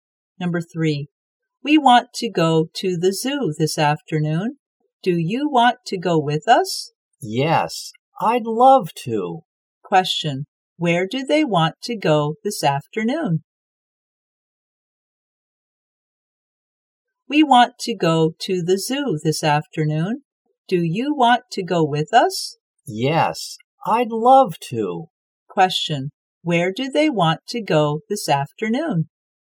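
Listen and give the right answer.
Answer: To the zoo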